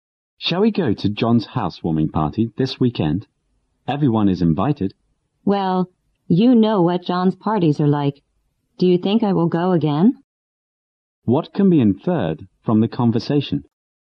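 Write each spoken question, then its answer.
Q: What can be inferred from the conversation?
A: The man won't go, because John's parties are unpleasant.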